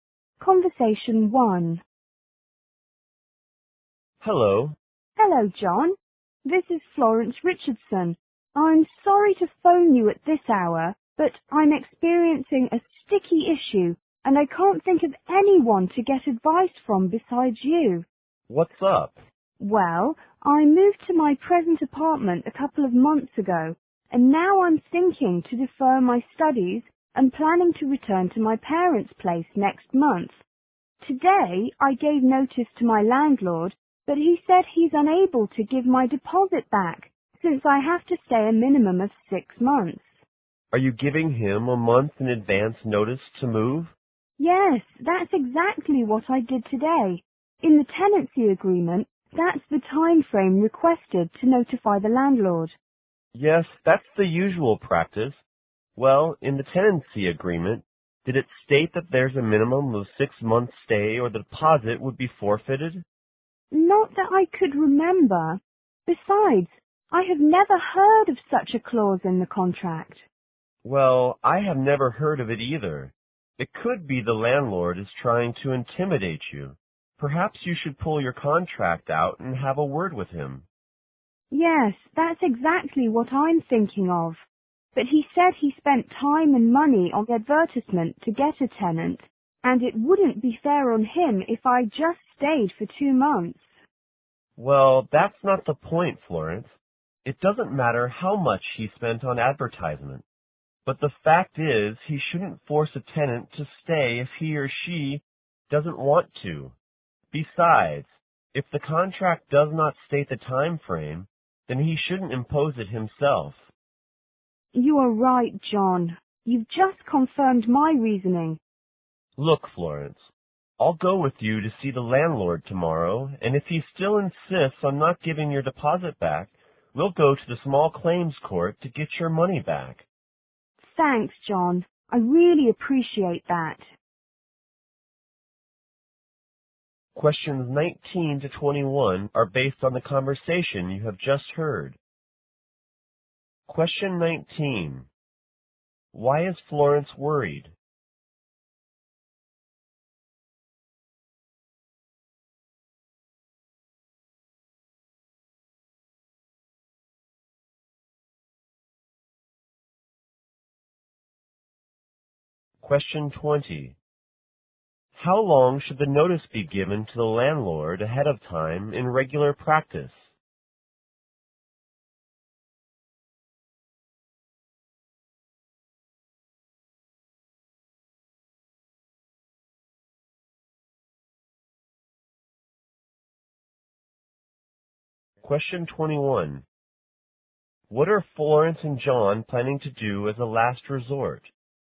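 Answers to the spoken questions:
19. Her landlord says he won't give her deposit back.
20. One month
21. Go to the small claims court to get the money back.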